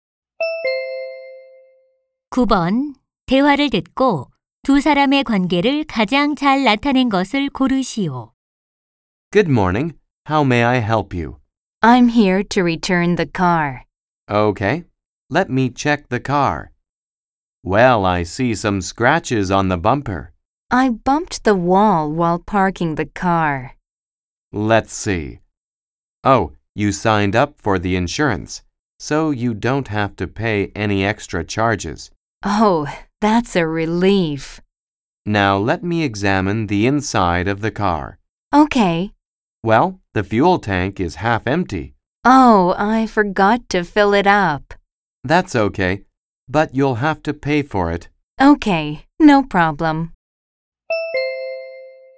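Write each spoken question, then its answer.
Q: 대화를 듣고 두 사람의 관계를 가장 잘 나타낸 것을 고르시오.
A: 렌터카 직원 - 고객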